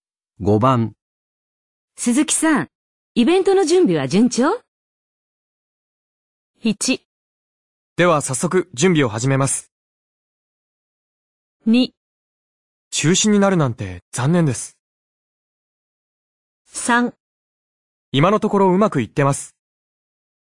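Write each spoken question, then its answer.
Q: 鈴木さん、イベントの準備は順調?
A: 3: 今のところうまくいってます。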